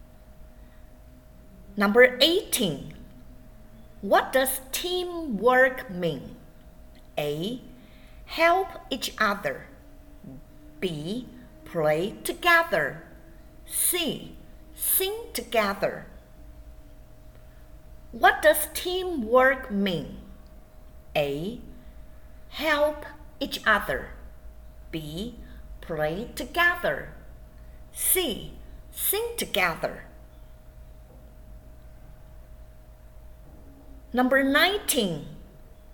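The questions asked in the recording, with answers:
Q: What does teamwork mean?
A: A: Help each other.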